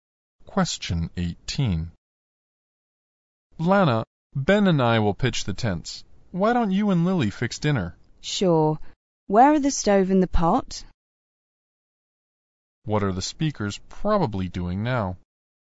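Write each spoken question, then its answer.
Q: What are the speakers probably doing now?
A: Camping.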